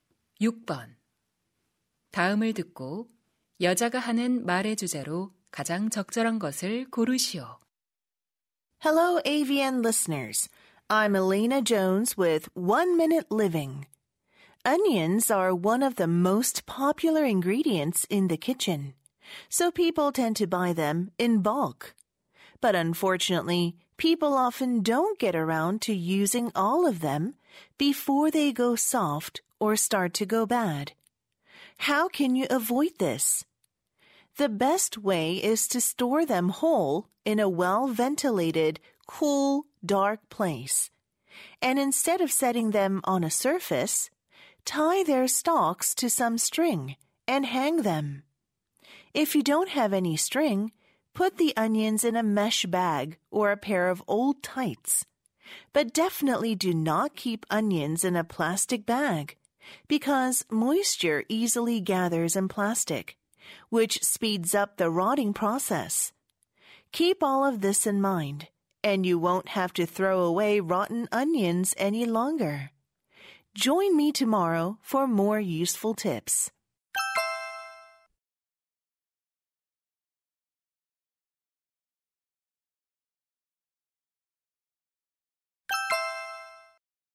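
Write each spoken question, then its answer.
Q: 다음을 듣고 여자가 하는 말의 주제로 가장 적절한 것을 고르시오.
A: 양파를 올바르게 보관하는 방법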